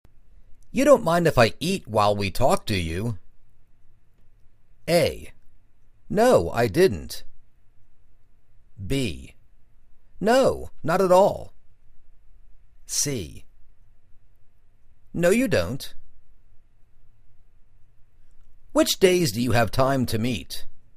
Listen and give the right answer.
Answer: No, not at all.